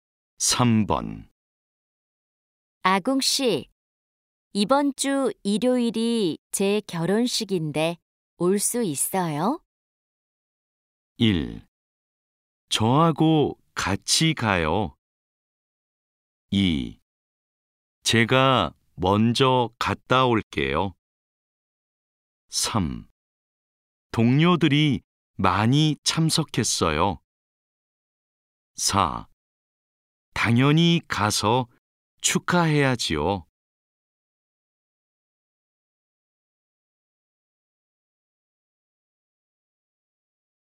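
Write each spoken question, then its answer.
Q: 아궁 씨, 이번 주 일요일이 제 결혼식인데 올 수 있어요?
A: 4: 당연히 가서 축하해야지요.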